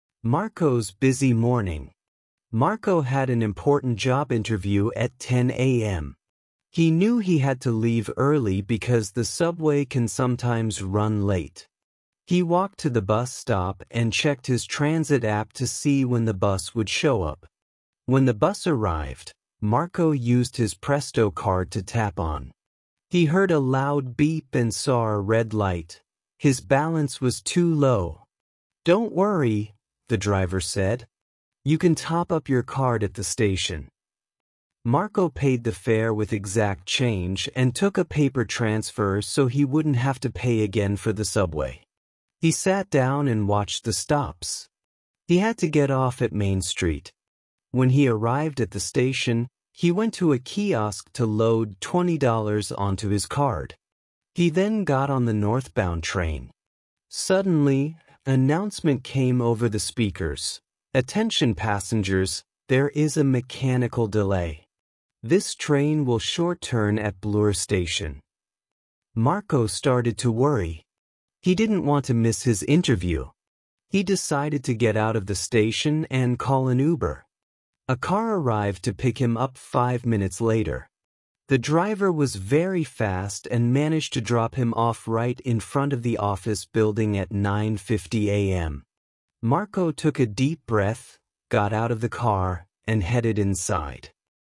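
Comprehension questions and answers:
II. Answer these based on the story "Marco's Busy Morning" and your knowledge of transit.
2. Why did Marco decide to leave his house early?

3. What happened when Marco tried to tap on the bus?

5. What did Marco use to pay the fare when his card didn't work?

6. What is the purpose of the transfer Marco received?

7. Where did Marco go to load money onto his card?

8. Which vehicle did Marco get on after leaving the bus?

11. Why did Marco get out of the subway station before reaching his destination?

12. How did Marco get to the office after leaving the subway?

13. What time did Marco finally arrive at his destination?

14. In the story, who picked Marco up?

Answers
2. Because the subway can sometimes run late and he had an important job interview at 10 a.m.
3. He heard a loud beep and saw a red light; his balance was too low.
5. Exact change
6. 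So he wouldn't have to pay again for the subway
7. A kiosk at the station
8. The northbound train (subway)
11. There was a mechanical delay and the train would short turn at Bloor Station, so he worried about missing his interview.
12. He called an Uber
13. 9:50 a.m.
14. An Uber driver

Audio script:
Marco's Busy Morning
Marco had an important job interview at 10:00 AM. He knew he had to leave early because the subway can sometimes run late. He walked to the bus stop and checked his transit app to see when the bus would show up.
When the bus arrived, Marco used his Presto card to tap on. He heard a loud beep and saw a red light; his balance was too low! "Don't worry," the driver said. "You can top up your card at the station." Marco paid the fare with exact change and took a paper transfer so he wouldn't have to pay again for the subway.
He sat down and watched the stops. He had to get off at Main Street. 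When he arrived at the station, he went to a kiosk to load twenty dollars onto his card. He then got on the northbound train. Suddenly, an announcement came over the speakers: "Attention passengers, there is a mechanical delay. This train will short-turn at Bloor Station."
Marco started to worry. He didn't want to miss his interview. He decided to get out of the station and call an Uber. A car arrived to pick him up five minutes later. The driver was very fast and managed to drop him off right in front of the office building at 9:50 AM. Marco took a deep breath, got out of the car, and headed inside.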